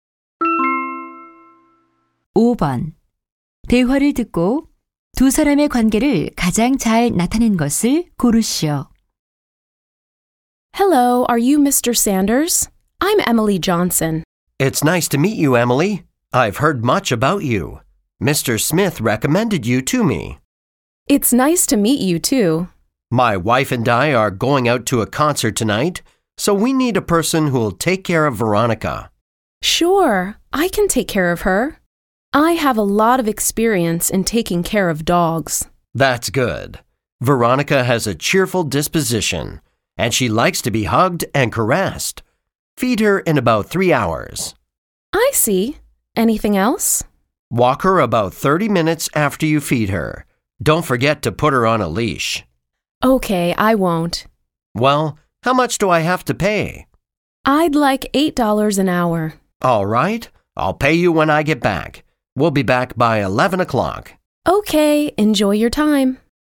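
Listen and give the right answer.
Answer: 개 주인 - 애완견 돌보미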